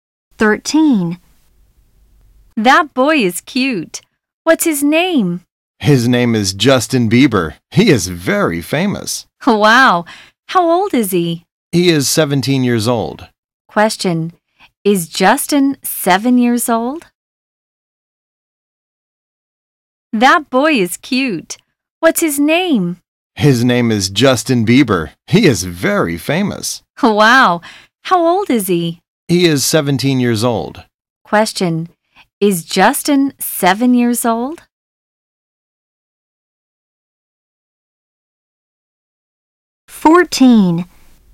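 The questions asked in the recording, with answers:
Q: Is Justin 7 years old?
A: No, he is 17 years old.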